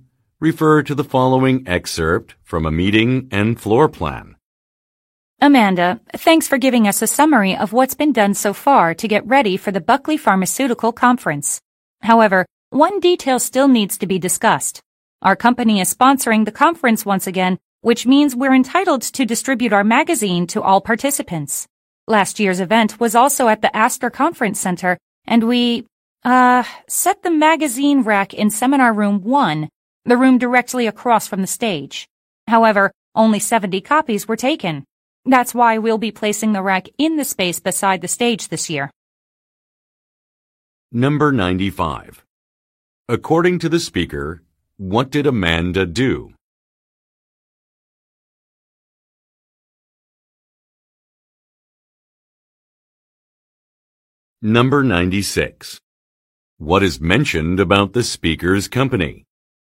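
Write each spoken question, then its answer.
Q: According to the speaker, what did Amanda do?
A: She gave a summary of what has been done so far to prepare for the conference.

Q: What is mentioned about the speaker's company?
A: It is sponsoring the conference again.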